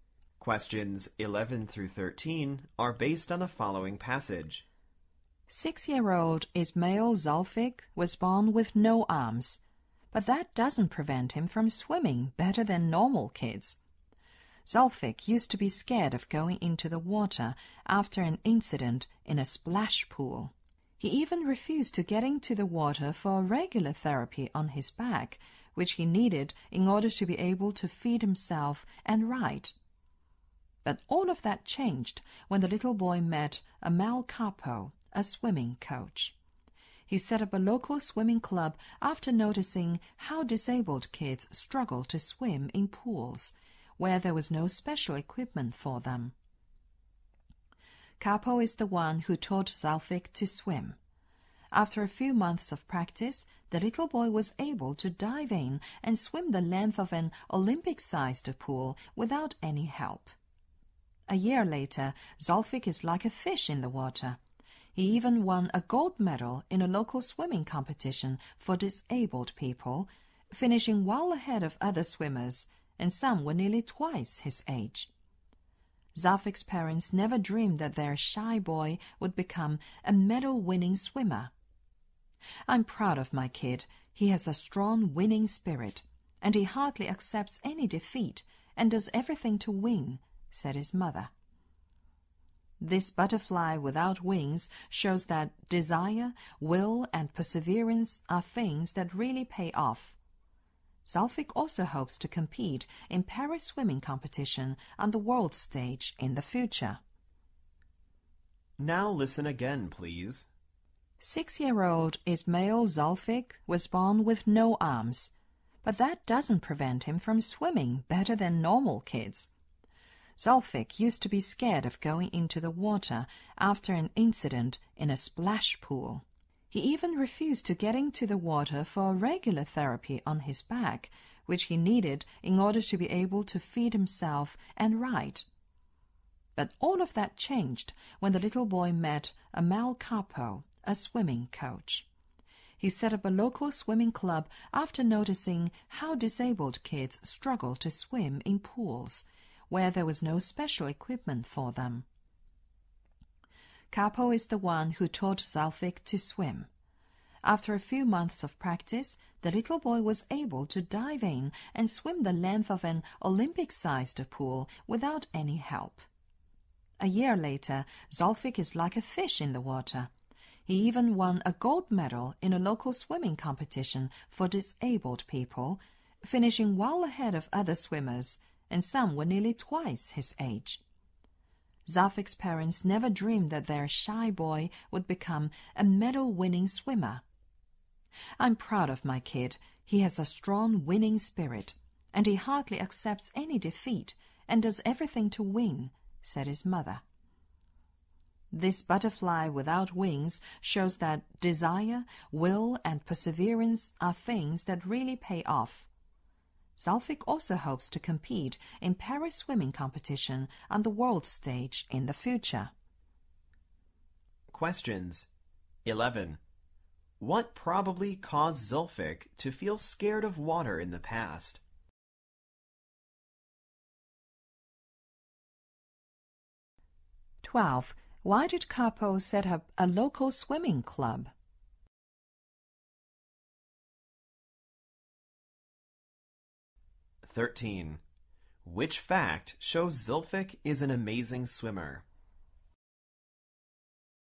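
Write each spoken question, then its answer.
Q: What probably caused Zulfik to feel scared of water in the past?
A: An incident in a splash pool

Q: Why did Kapo set up a local swimming club?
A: He noticed that disabled kids struggled to swim in pools with no special equipment for them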